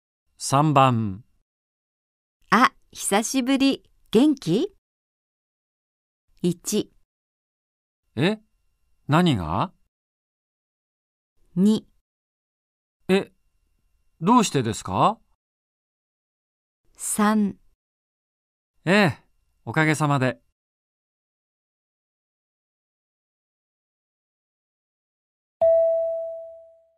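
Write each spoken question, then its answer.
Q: あ、久しぶり。元気?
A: 3: ええ、おかげさまで。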